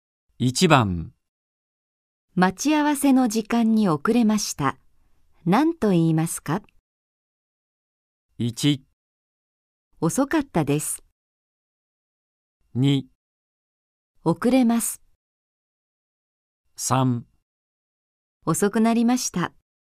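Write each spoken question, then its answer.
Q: 待ち合わせの時間に遅れました。何と言いますか?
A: 3: 遅くなりました。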